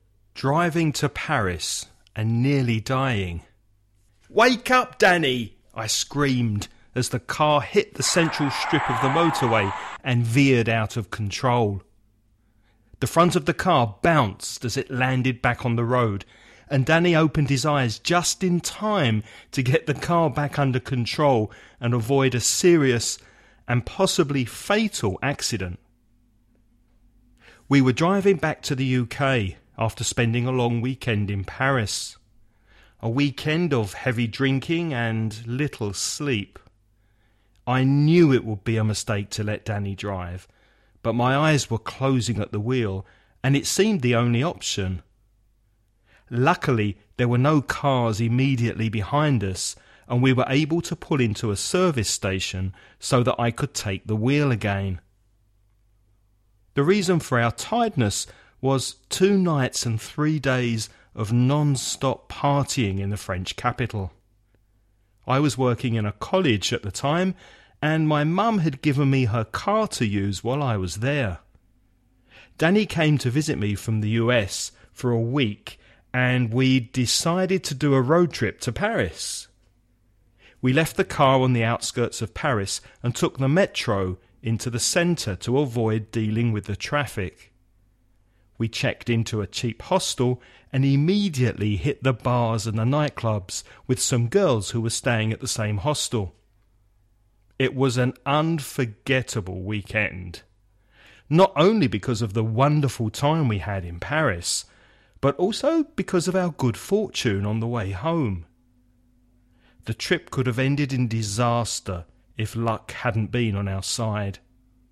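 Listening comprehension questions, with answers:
Now listen and answer the questions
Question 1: Why did Danny lose control of the car?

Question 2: Where did the men stop in order to change drivers?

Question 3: Whose car was it?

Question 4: How did they get from the suburbs of Paris to the centre?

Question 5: Where did they sleep?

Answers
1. He fell asleep at the wheel because he was so tired.
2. At a service station
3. The speaker's mum's car
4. By metro
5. In a cheap hostel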